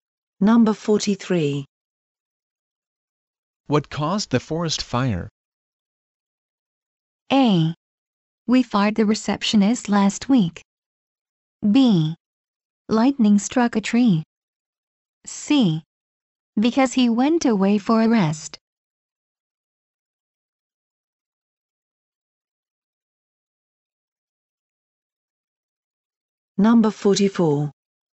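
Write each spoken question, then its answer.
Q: What caused the forest fire?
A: B: Lightning struck a tree.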